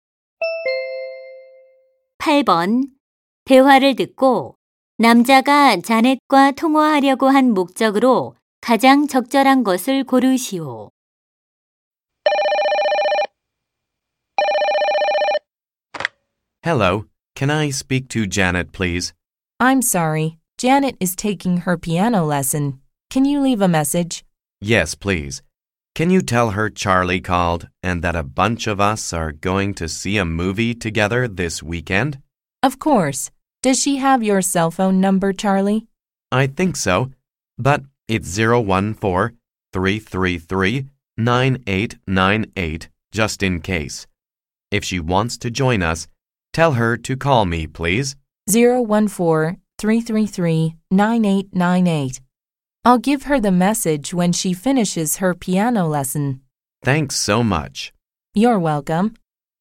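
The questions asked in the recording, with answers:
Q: 대화를 듣고 남자가 자넷과 통화하려고 한 목적으로 가장 적절한 것을 고르시오.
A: 이번 주말 영화 보러 가자고 제안하려고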